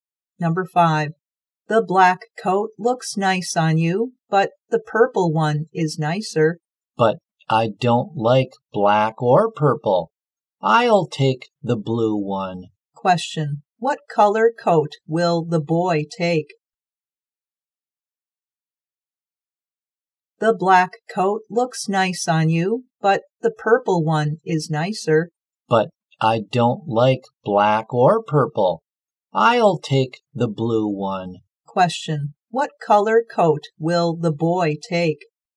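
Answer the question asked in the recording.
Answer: Blue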